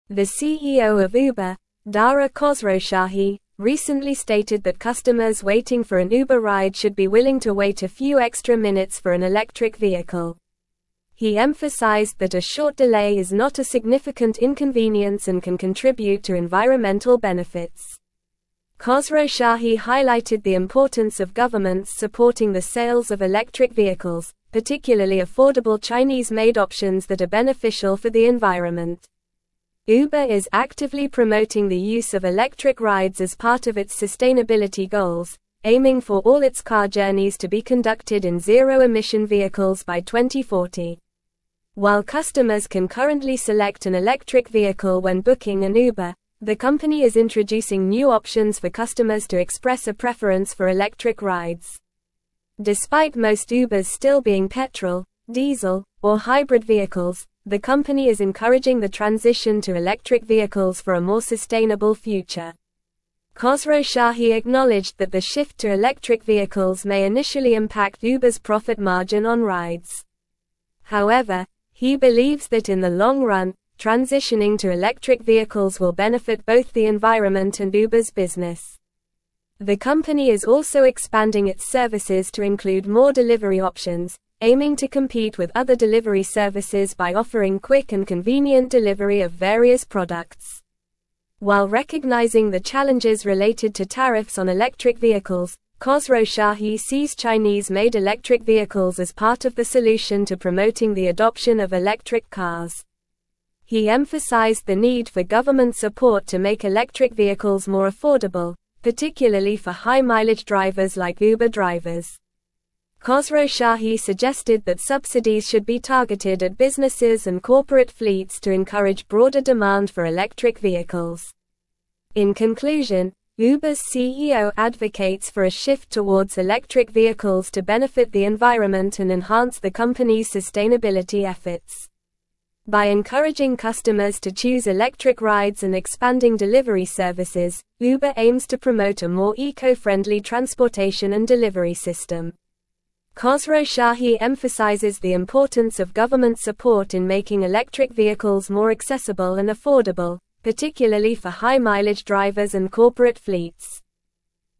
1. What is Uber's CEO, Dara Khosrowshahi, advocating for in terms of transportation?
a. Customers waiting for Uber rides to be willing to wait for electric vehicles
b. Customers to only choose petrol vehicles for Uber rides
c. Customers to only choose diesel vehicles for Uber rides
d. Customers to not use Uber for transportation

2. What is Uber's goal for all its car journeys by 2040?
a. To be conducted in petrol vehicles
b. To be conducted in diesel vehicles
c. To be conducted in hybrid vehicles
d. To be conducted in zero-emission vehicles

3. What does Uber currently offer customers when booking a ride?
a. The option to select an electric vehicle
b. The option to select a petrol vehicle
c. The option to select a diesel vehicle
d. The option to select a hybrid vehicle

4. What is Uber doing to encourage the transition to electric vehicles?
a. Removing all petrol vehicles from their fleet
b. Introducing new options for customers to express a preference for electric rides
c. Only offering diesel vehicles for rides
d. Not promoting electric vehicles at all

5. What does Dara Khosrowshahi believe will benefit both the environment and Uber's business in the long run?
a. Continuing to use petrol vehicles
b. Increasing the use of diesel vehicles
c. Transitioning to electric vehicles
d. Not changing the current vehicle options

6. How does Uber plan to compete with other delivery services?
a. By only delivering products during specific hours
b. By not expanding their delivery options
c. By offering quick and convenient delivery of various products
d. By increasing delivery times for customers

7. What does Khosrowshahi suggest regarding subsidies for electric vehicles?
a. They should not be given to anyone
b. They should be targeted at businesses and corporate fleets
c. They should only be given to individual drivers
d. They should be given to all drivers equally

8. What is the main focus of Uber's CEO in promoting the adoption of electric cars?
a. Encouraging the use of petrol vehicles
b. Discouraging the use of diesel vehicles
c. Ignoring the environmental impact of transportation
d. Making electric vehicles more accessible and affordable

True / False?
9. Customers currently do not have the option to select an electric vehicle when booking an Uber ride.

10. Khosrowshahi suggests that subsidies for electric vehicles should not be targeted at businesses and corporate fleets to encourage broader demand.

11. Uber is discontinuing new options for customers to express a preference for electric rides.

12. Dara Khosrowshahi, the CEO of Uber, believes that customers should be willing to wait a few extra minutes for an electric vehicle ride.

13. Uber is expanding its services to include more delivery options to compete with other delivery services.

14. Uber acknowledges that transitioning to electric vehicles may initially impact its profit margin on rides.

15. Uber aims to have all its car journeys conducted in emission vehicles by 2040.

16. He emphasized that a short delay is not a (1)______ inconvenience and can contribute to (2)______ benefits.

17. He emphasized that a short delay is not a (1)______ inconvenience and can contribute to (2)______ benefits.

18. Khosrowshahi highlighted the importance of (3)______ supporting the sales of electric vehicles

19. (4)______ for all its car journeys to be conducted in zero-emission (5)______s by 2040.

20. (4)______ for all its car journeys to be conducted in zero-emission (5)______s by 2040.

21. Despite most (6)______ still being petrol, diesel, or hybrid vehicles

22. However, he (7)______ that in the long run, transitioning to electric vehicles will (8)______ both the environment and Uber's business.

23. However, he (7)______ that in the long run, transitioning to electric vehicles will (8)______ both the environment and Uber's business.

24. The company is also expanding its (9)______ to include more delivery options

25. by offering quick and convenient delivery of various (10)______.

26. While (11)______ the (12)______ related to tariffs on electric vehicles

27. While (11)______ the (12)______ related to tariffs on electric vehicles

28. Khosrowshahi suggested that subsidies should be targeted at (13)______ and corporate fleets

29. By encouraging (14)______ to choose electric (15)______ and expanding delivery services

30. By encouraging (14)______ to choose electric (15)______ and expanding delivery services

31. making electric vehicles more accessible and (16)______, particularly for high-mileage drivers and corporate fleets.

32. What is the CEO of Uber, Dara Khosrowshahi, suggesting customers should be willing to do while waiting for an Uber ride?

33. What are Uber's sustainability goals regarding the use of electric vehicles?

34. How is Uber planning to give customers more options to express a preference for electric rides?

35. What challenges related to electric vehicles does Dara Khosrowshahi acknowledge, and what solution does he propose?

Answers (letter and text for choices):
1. a. Customers waiting for Uber rides to be willing to wait for electric vehicles
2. d. To be conducted in zero-emission vehicles
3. a. The option to select an electric vehicle
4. b. Introducing new options for customers to express a preference for electric rides
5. c. Transitioning to electric vehicles
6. c. By offering quick and convenient delivery of various products
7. b. They should be targeted at businesses and corporate fleets
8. d. Making electric vehicles more accessible and affordable
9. False
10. False
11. False
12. True
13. True
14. True
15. False
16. significant
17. environmental
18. governments
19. aiming
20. vehicle
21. Ubers
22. believes
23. benefit
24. services
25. products
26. recognizing
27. challenges
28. businesses
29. customers
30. rides
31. affordable
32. Customers waiting for an Uber ride should be willing to wait a few extra minutes for an electric vehicle.
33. Uber aims for all its car journeys to be conducted in zero-emission vehicles by 2040.
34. Uber is introducing new options for customers to express a preference for electric rides in addition to being able to select an electric vehicle when booking an Uber.
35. Khosrowshahi acknowledges challenges related to tariffs on electric vehicles and proposes Chinese-made electric vehicles as part of the solution to promoting their adoption.

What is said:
The CEO of Uber, Dara Khosrowshahi, recently stated that customers waiting for an Uber ride should be willing to wait a few extra minutes for an electric vehicle. He emphasized that a short delay is not a significant inconvenience and can contribute to environmental benefits. Khosrowshahi highlighted the importance of governments supporting the sales of electric vehicles, particularly affordable Chinese-made options that are beneficial for the environment.
Uber is actively promoting the use of electric rides as part of its sustainability goals, aiming for all its car journeys to be conducted in zero-emission vehicles by 2040. While customers can currently select an electric vehicle when booking an Uber, the company is introducing new options for customers to express a preference for electric rides. Despite most Ubers still being petrol, diesel, or hybrid vehicles, the company is encouraging the transition to electric vehicles for a more sustainable future.
Khosrowshahi acknowledged that the shift to electric vehicles may initially impact Uber's profit margin on rides. However, he believes that in the long run, transitioning to electric vehicles will benefit both the environment and Uber's business. The company is also expanding its services to include more delivery options, aiming to compete with other delivery services by offering quick and convenient delivery of various products.
While recognizing the challenges related to tariffs on electric vehicles, Khosrowshahi sees Chinese-made electric vehicles as part of the solution to promoting the adoption of electric cars. He emphasized the need for government support to make electric vehicles more affordable, particularly for high-mileage drivers like Uber drivers. Khosrowshahi suggested that subsidies should be targeted at businesses and corporate fleets to encourage broader demand for electric vehicles.
In conclusion, Uber's CEO advocates for a shift towards electric vehicles to benefit the environment and enhance the company's sustainability efforts. By encouraging customers to choose electric rides and expanding delivery services, Uber aims to promote a more eco-friendly transportation and delivery system. Khosrowshahi emphasizes the importance of government support in making electric vehicles more accessible and affordable, particularly for high-mileage drivers and corporate fleets.

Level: Level 4